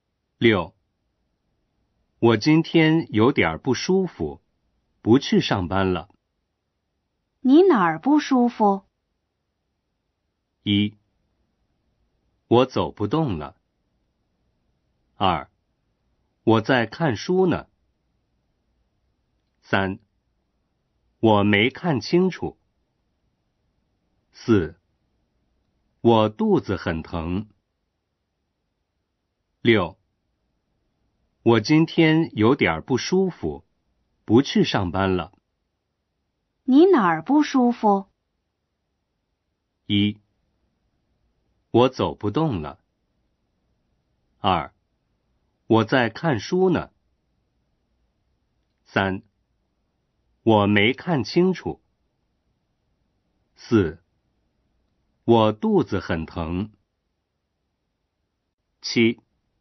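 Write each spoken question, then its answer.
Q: 你哪儿不舒服?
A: 四: 我肚子很疼。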